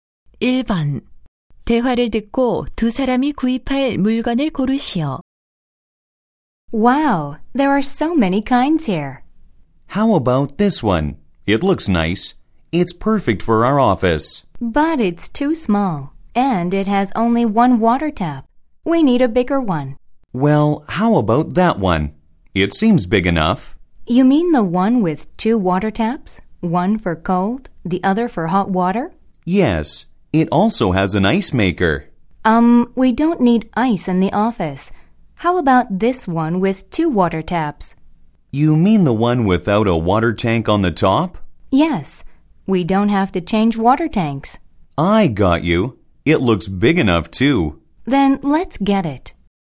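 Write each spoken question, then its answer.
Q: 대화를 듣고 두 사람이 구입할 물건을 고르시오.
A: 물통이 없는, 냉온수 꼭지 두 개짜리 정수기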